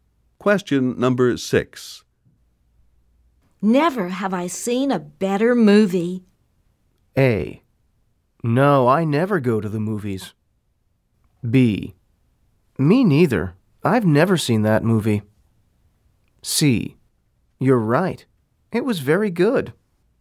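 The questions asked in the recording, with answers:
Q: Never have I seen a better movie.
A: C: You're right. It was very good.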